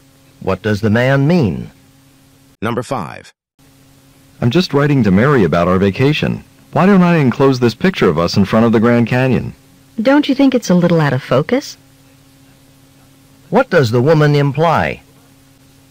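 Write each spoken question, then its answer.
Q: What does the woman imply?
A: The picture is blurry, so they shouldn't send it.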